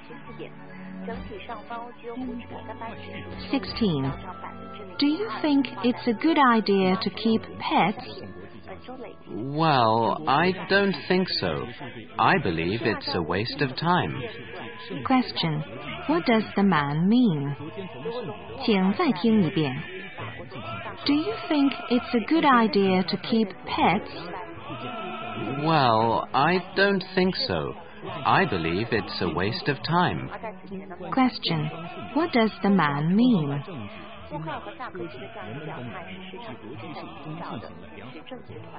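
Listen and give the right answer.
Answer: Keeping pets is not a good idea; it's a waste of time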